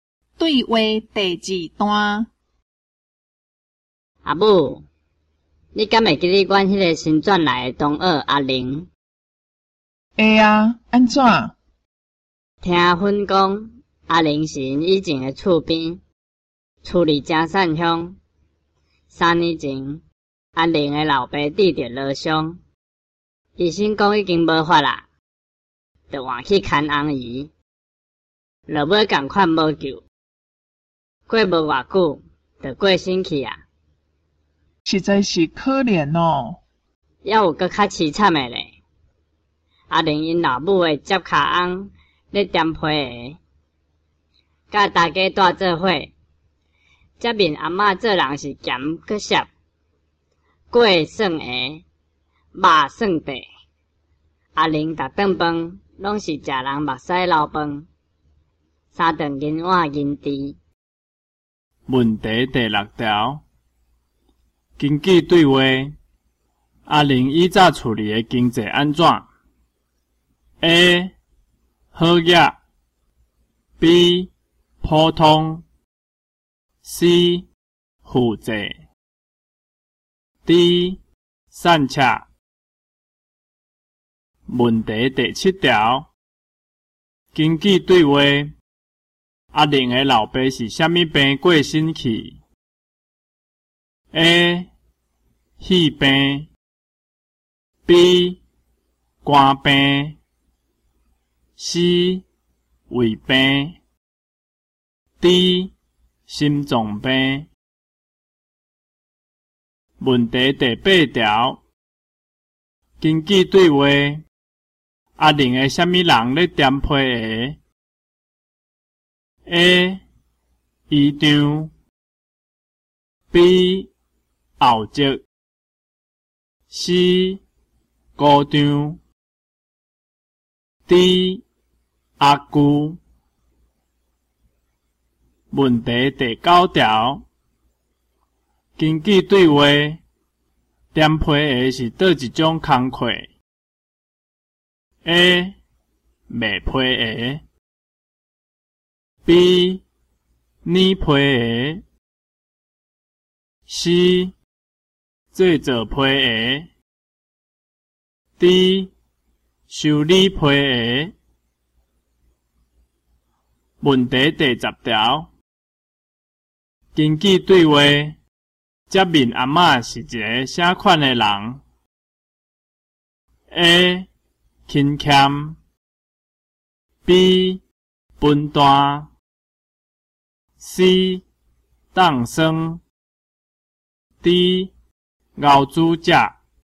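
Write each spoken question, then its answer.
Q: 根据对话,阿玲以早处理的经济安怎 ?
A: D: 善恰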